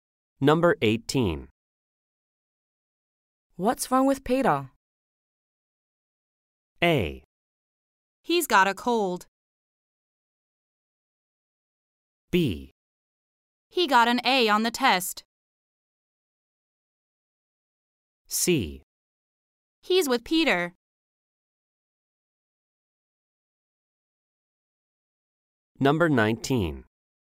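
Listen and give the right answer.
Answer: A: He's got a cold.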